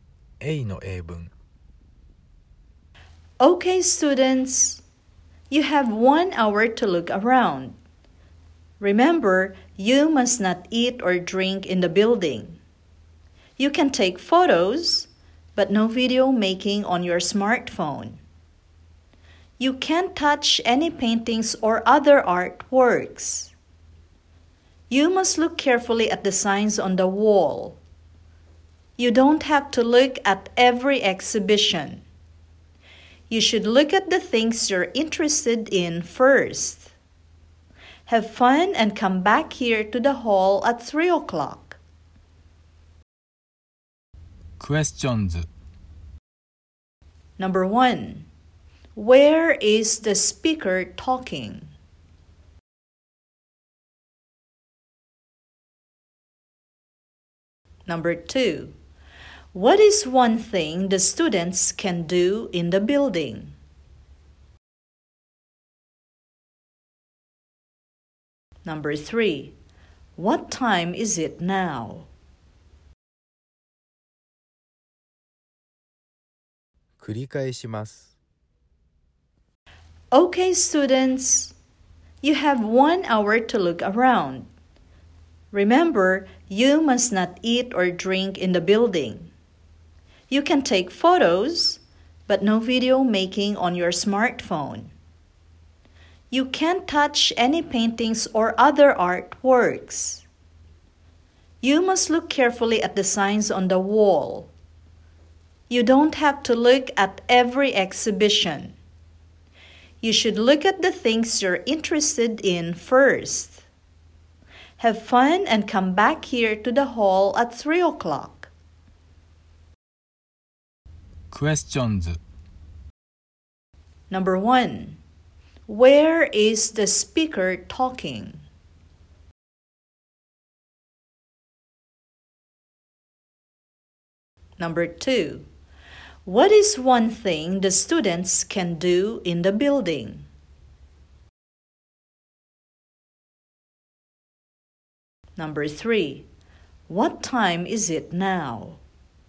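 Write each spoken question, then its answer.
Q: What is one thing the students can do in the building?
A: Take photos

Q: What time is it now?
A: 2 o'clock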